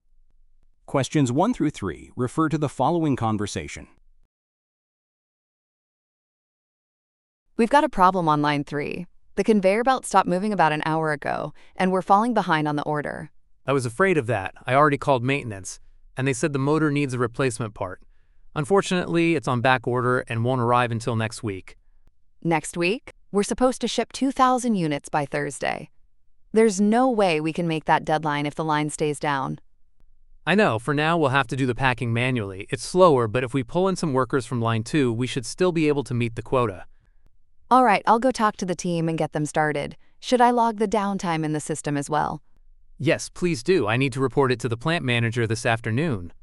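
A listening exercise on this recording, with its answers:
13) Where does this conversation most likely take place?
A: At a manufacturing plant

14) What is the problem?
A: A machine malfunction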